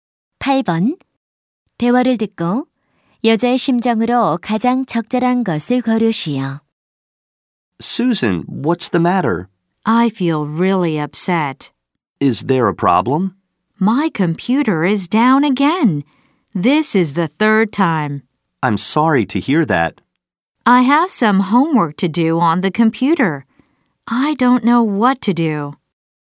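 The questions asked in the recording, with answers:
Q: 대화를 듣고 여자의 심정으로 가장 적절한 것을 고르시오.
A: 속상함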